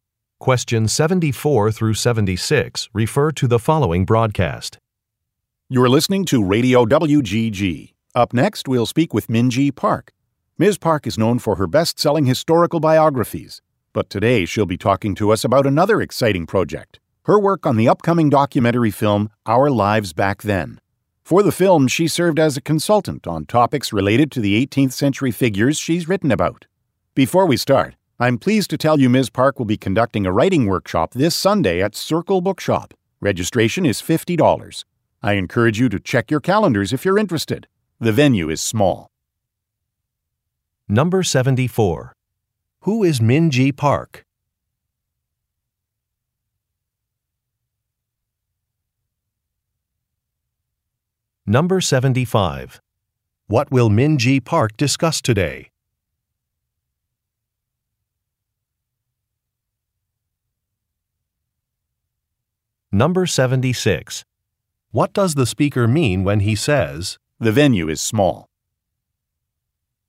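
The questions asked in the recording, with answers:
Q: Who is Minji Park?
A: An author of historical biographies

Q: What will Minji Park discuss today?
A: Her work on a documentary film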